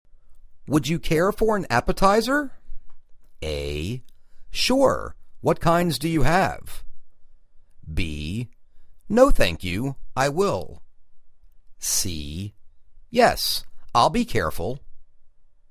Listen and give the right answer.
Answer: Sure, what kinds do you have?